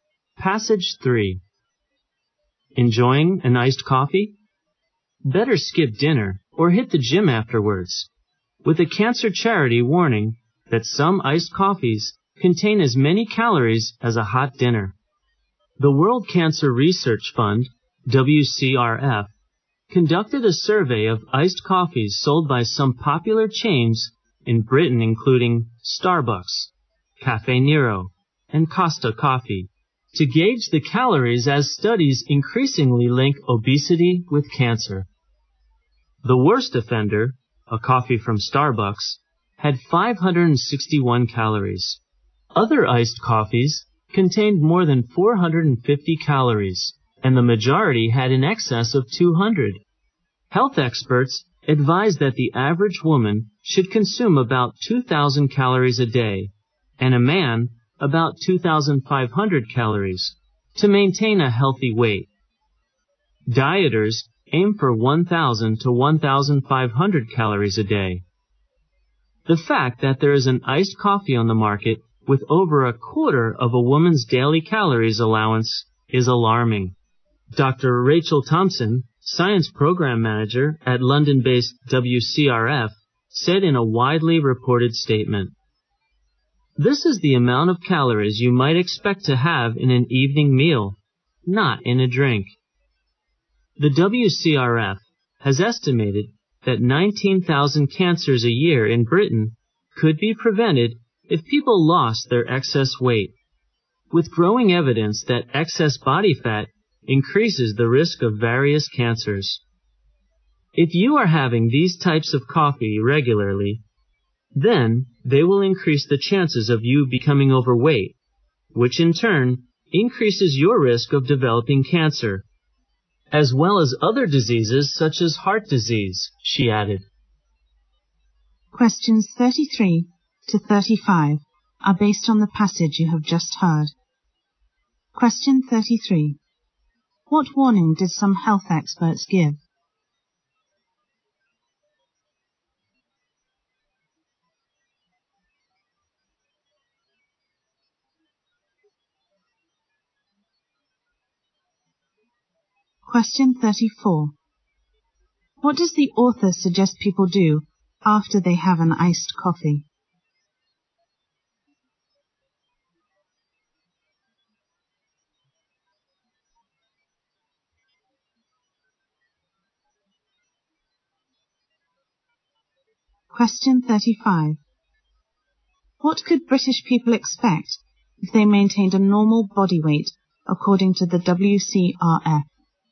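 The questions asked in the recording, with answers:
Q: What warning did some health experts give?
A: Some iced coffees contain as many calories as a hot dinner.

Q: What does the author suggest people do after they have an iced coffee?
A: Skip dinner or go to the gym.

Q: What could British people expect if they maintained a normal body weight according to the WCRF?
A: 19,000 cancers a year could be prevented.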